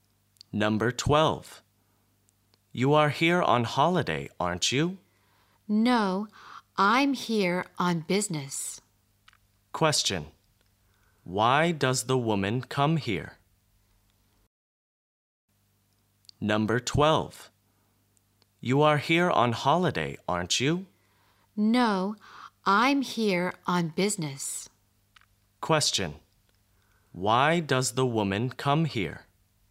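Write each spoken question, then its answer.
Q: Why does the woman come here?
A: On business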